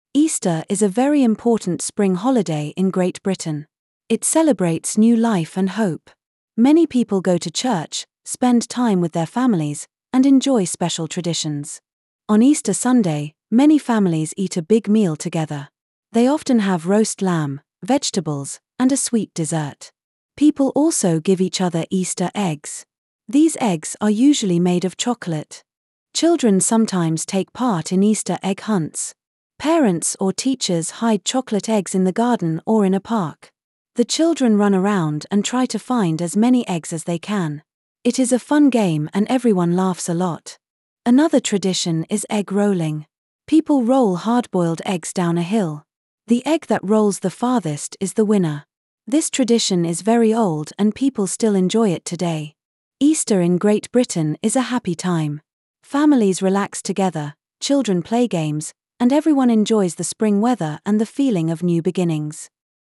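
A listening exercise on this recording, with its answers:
) Listen to the recording and then answer the questions (page 1):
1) Is Easter an important holiday in Great Britain?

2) What do people usually do on Easter Sunday?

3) What happens during Easter egg hunts?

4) How is the egg rolling game played?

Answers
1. Yes, it is a very important spring holiday.
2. Families eat a big meal together (roast lamb, vegetables, dessert) and give each other Easter eggs.
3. Parents or teachers hide chocolate eggs and children try to find as many as they can.
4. People roll hard-boiled eggs down a hill; the egg that rolls farthest wins.

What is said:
• Easter is a very important spring holiday in Great Britain. It celebrates new life and hope. Many people go to church, spend time with their families, and enjoy special traditions.
On Easter Sunday, many families eat a big meal together. They often have roast lamb, vegetables, and a sweet dessert. 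People also give each other Easter eggs. These eggs are usually made of chocolate.
Children sometimes take part in Easter egg hunts. Parents or teachers hide chocolate eggs in the garden or in a park. The children run around and try to find as many eggs as they can. It is a fun game and everyone laughs a lot.
Another tradition is egg rolling. People roll hard-boiled eggs down a hill. The egg that rolls the farthest is the winner. This tradition is very old and people still enjoy it today.
Easter in Great Britain is a happy time. Families relax together, children play games, and everyone enjoys the spring weather and the feeling of new beginnings.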